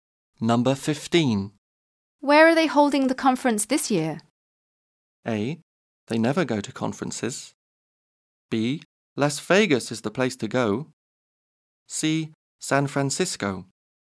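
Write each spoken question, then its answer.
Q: Where are they holding the conference this year?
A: C: San Francisco.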